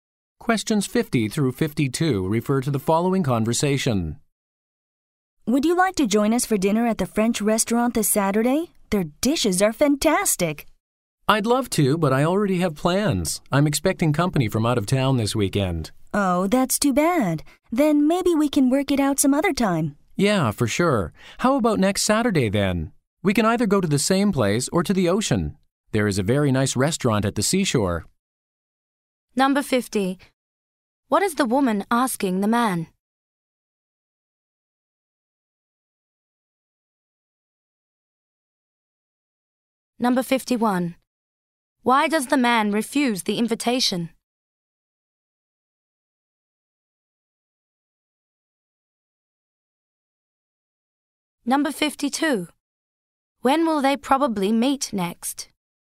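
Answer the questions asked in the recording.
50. To join them for dinner at a French restaurant on Saturday
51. He is expecting visitors from out of town
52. Next Saturday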